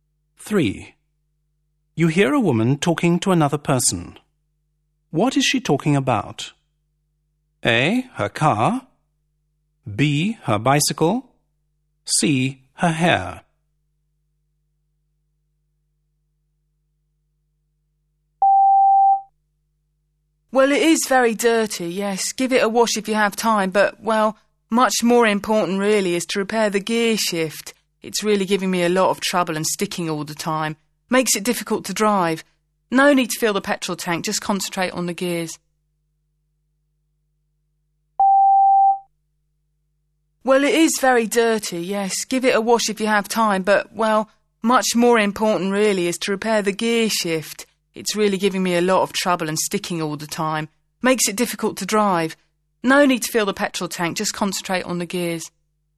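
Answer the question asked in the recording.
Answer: A: Her car.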